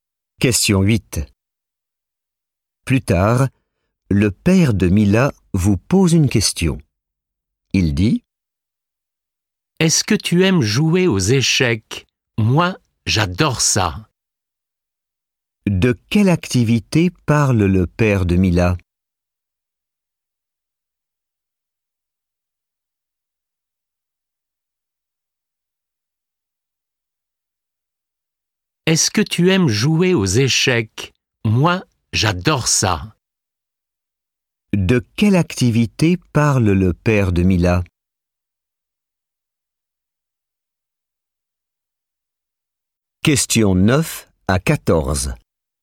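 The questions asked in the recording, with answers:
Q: De quelle activité parle le père de Mila?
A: Les échecs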